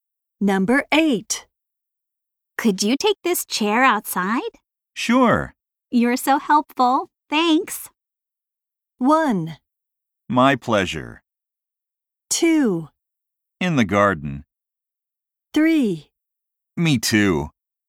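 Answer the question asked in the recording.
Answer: 1: My pleasure.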